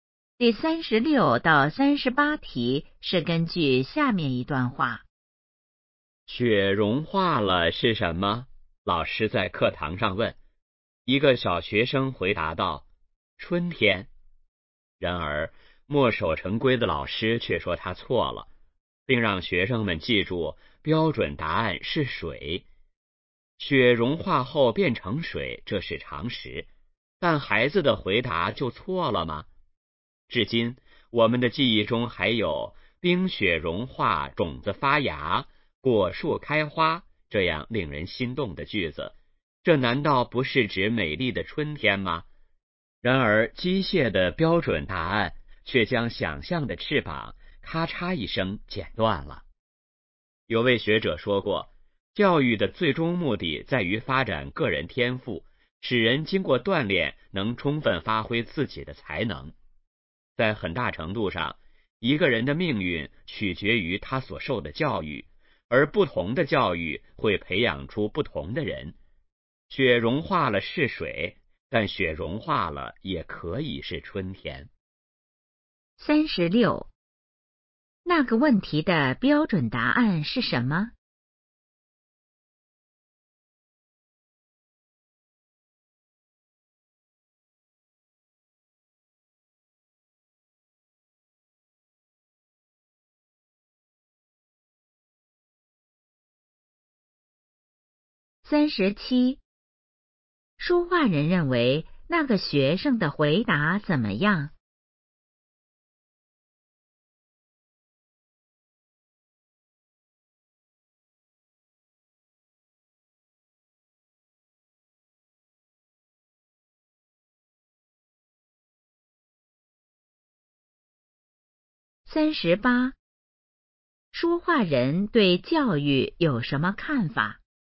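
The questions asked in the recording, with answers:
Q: 说话人认为那个学生的回答怎么样?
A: 没有错,很有想象力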